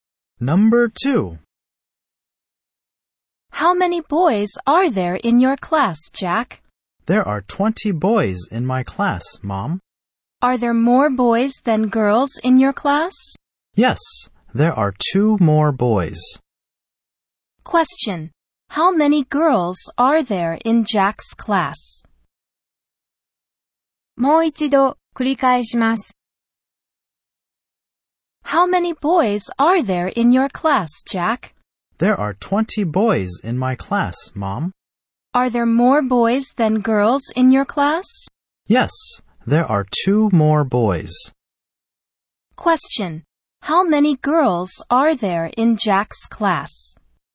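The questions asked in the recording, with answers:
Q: How many girls are there in Jack's class?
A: 18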